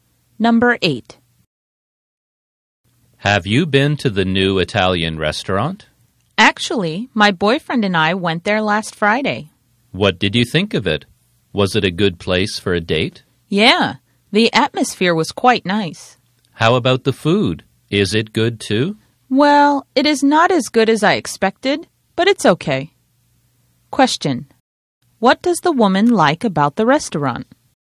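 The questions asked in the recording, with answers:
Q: What does the woman like about the restaurant?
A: The atmosphere.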